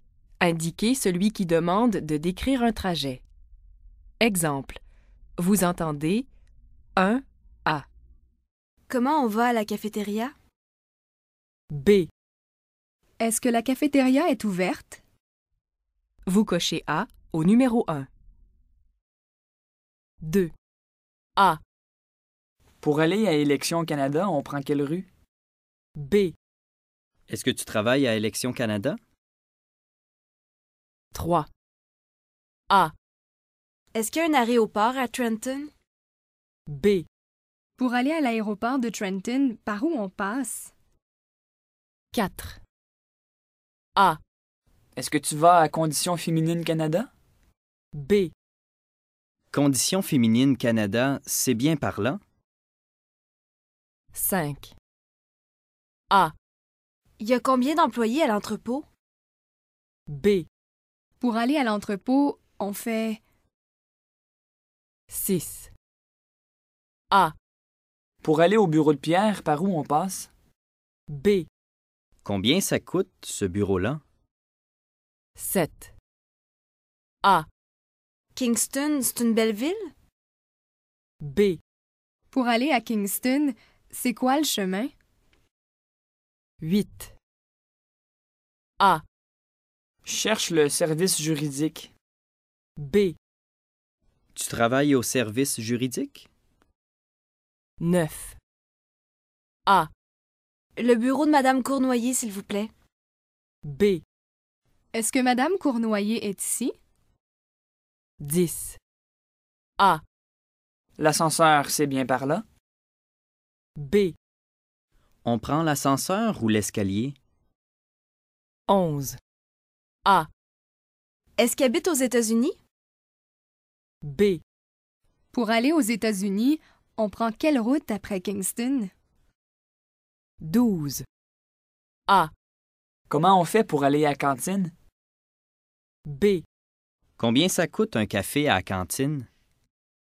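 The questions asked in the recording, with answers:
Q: Indiquez celui qui demande de décrire un trajet.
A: A: Pour aller à Élections Canada, on prend quelle rue?

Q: Indiquez celui qui demande de décrire un trajet.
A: B: Pour aller à l'aéroport de Trenton, par où on passe?

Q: Indiquez celui qui demande de décrire un trajet.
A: B: Pour aller à l'entrepôt, on fait...

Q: Indiquez celui qui demande de décrire un trajet.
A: A: Pour aller au bureau de Pierre, par où on passe?

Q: Indiquez celui qui demande de décrire un trajet.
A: B: Pour aller à Kingston... C'est quoi le chemin?

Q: Indiquez celui qui demande de décrire un trajet.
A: B: Pour aller aux États-Unis, on prend quelle route après Kingston?

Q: Indiquez celui qui demande de décrire un trajet.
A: A: Comment on fait pour aller à cantine?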